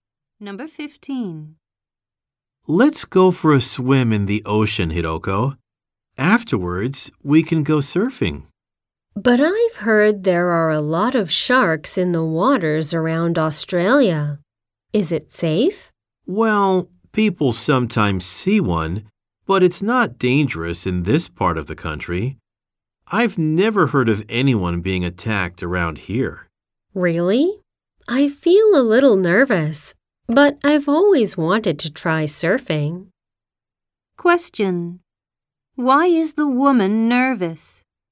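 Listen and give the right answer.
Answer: She heard there are many sharks in the waters around Australia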